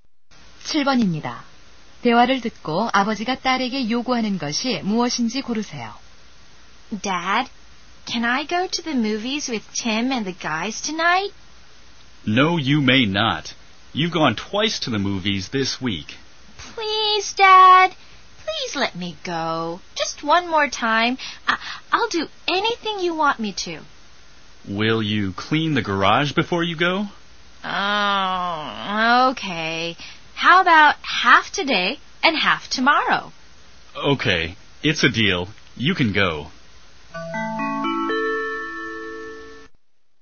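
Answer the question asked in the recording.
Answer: 차고 청소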